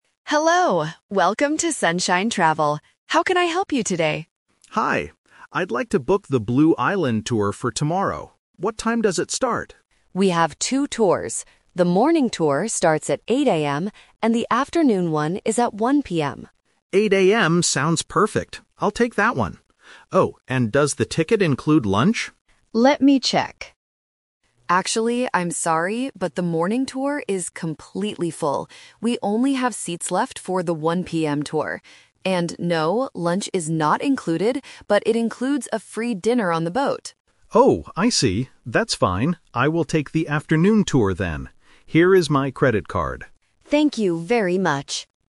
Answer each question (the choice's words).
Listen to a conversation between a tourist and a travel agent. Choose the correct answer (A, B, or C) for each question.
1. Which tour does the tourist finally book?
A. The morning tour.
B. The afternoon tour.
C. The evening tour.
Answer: The afternoon tour.

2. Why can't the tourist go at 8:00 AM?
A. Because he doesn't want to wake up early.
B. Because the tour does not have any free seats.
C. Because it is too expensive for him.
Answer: Because the tour does not have any free seats.

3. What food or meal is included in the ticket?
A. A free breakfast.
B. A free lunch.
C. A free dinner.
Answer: A free dinner.

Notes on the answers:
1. This is the Twist. The tourist first says "8:00 AM sounds perfect. I'll take that one" (the morning tour), but because it is full, he changes his mind and says "I will take the afternoon tour then." Option (A) is the trap. Option (C) is a trap using the word "dinner", but there is no evening tour mentioned.
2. The travel agent says the morning tour is "completely full," which means there are no free seats left. Option (A) and (C) are plausible real-life reasons, but they are not mentioned in the audio.
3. The travel agent clearly states that "lunch is not included, but it includes a free dinner on the boat." Option (B) is a trap; the tourist asks about lunch, but he doesn't get it. Option (A) is not mentioned.

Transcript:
Travel Agent: Hello, welcome to Sunshine Travel. How can I help you today?
Tourist: Hi. I'd like to book the Blue Island tour for tomorrow. What time does it start?
Travel Agent: We have two tours. The morning tour starts at 8:00 AM, and the afternoon one is at 1:00 PM.
Tourist: 8:00 AM sounds perfect. I'll take that one. Oh, and does the ticket include lunch?
Travel Agent: Let me check... Actually, I'm sorry, but the morning tour is completely full. We only have seats left for the 1:00 PM tour. And no, lunch is not included, but it includes a free dinner on the boat.
Tourist: Oh, I see. That's fine, I will take the afternoon tour then. Here is my credit card.